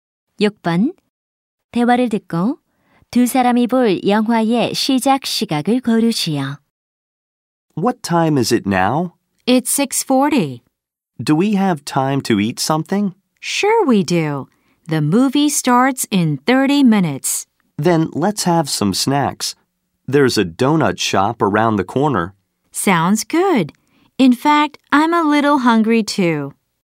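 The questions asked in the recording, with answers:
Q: 대화를 듣고 두 사람이 볼 영화의 시작 시각을 고르시오.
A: 7시 10분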